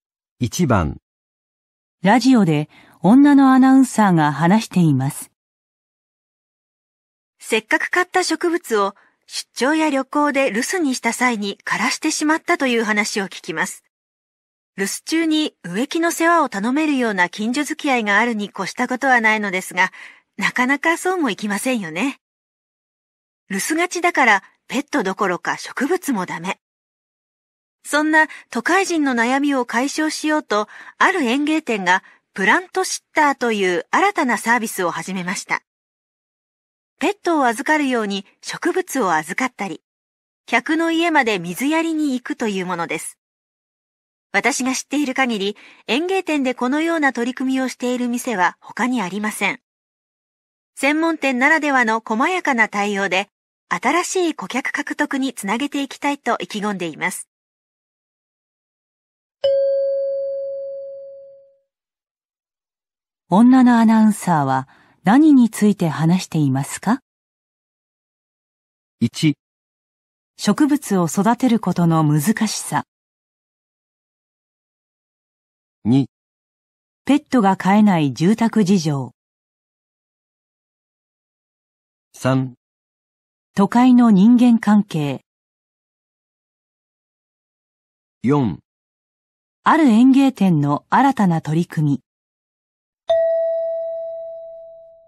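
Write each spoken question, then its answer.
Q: 女のアナウンサーは何について話していますか?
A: 4: ある園芸店の新たな取り組み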